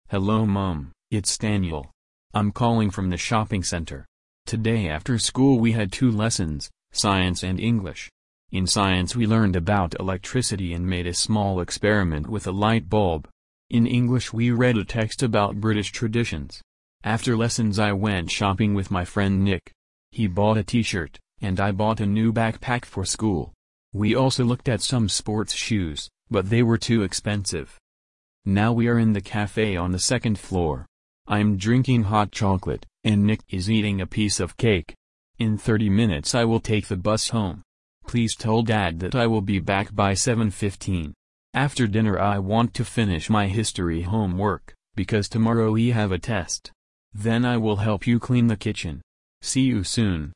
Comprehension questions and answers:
Прослушайте текст и определите, какие из приведённых утверждений A–E соответствуют содержанию текста (1 – Right), какие не соответствуют (2 – False).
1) Daniel is calling from the shopping centre.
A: Right

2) Today he had Science and English lessons.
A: Right

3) Daniel bought new sports shoes.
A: False

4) He will be home before 8 o'clock.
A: Right

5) Tomorrow Daniel has a History test.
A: Right

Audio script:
I'm calling from the shopping centre. Today after school we had two lessons — Science and English. In Science we learned about electricity and made a small experiment with a light bulb. In English we read a text about British traditions. After lessons I went shopping with my friend Nick. He bought a T-shirt, and I bought a new backpack for school. We also looked at some sports shoes, but they were too expensive.
Now we are in the café on the second floor. I'm drinking hot chocolate, and Nick is eating a piece of cake. In thirty minutes I will take the bus home. Please tell Dad that I will be back by 7:15. After dinner I want to finish my History homework, because tomorrow we have a test. Then I will help you clean the kitchen. See you soon!